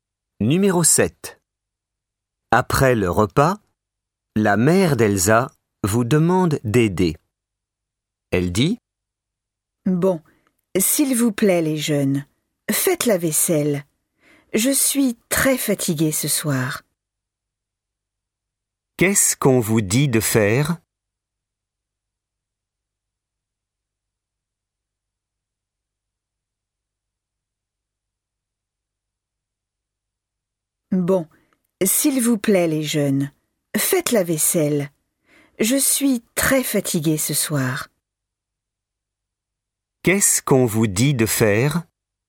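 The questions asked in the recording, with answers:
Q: Qu'est-ce qu'on vous dit de faire ?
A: La vaisselle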